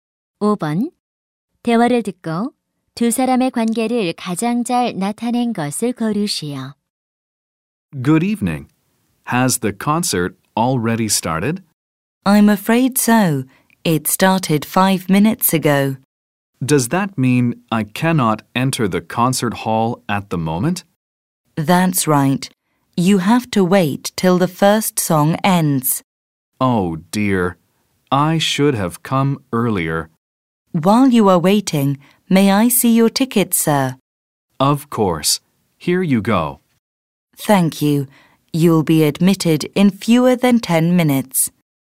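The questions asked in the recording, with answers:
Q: 대화를 듣고 두 사람의 관계를 가장 잘 나타낸 것을 고르시오.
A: 공연장 안내원과 관객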